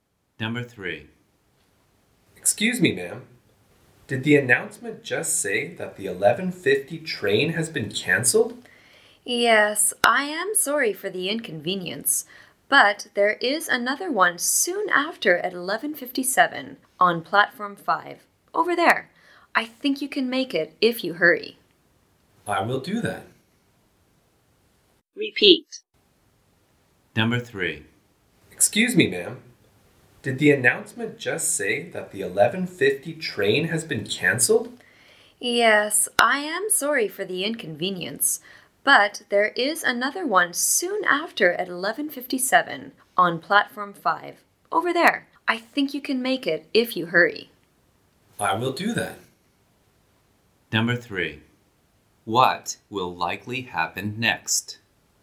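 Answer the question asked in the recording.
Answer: The man will hurry to Platform 5 to catch the 11:57 train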